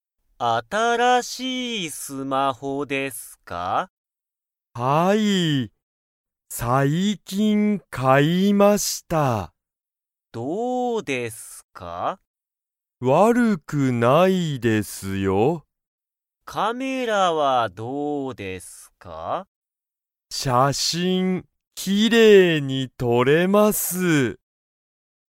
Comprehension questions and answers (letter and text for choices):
林(はやし)さんの新(あたら)しいスマホは、____。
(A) 悪(わる)くない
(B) 悪(わる)い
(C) きれいじゃない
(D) きれいだ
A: (A) 悪(わる)くない

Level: Level 1